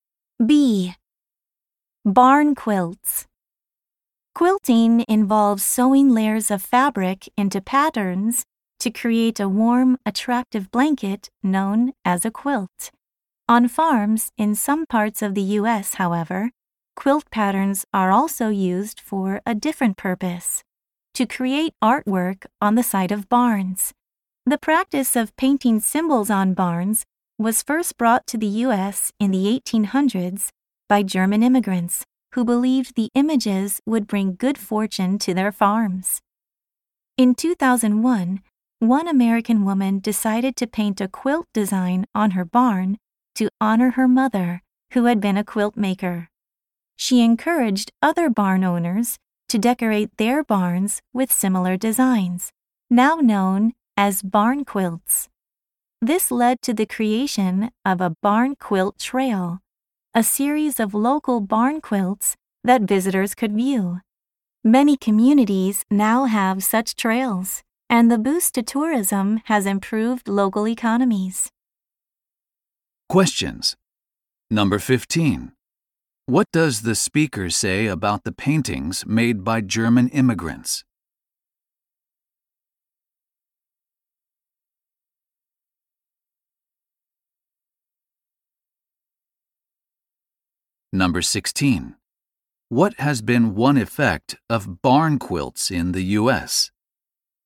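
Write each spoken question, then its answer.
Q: What does the speaker say about the paintings made by German immigrants?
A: They were believed to bring good fortune to farms

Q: What has been one effect of barn quilts in the U.S.?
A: Increased tourism has improved local economies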